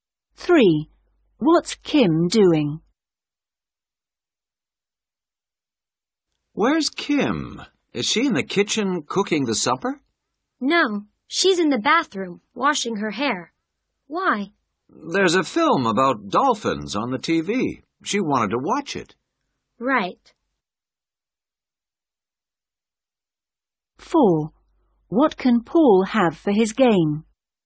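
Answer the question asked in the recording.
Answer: washing her hair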